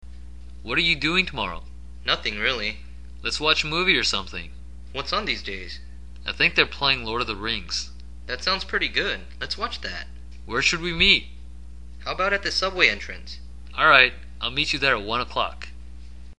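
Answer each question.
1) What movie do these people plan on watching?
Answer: Lord of the Rings

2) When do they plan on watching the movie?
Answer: Tomorrow

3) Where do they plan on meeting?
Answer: At the subway entrance

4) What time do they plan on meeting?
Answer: At one o'clock

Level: Basic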